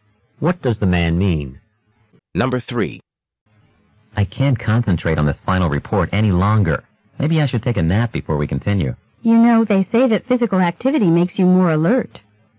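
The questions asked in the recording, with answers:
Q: What does the woman imply?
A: Some physical activity, not a nap, would help them stay alert.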